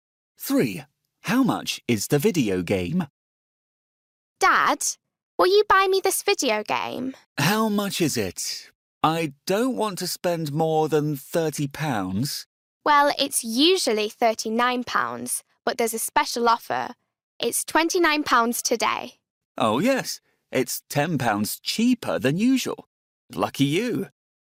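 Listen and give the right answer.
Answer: £29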